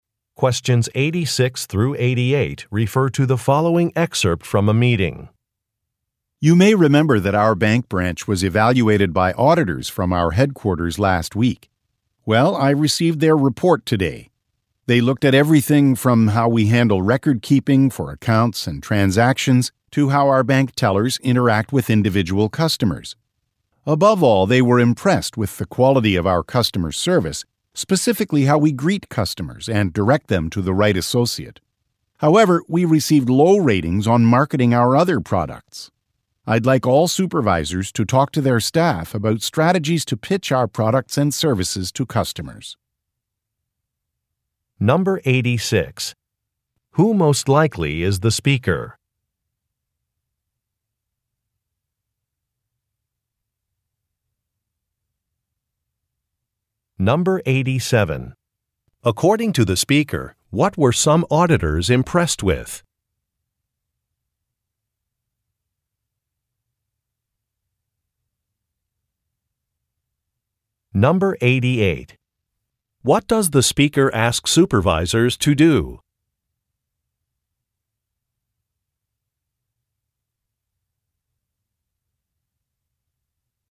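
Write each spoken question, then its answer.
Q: Who most likely is the speaker?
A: A bank manager

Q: According to the speaker, what were some auditors impressed with?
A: The quality of customer service

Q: What does the speaker ask supervisors to do?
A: Talk to their staff about strategies to pitch products and services to customers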